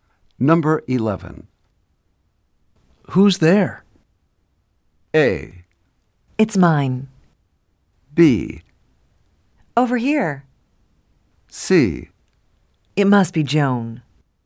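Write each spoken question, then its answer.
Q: Who's there?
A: C: It must be Joan.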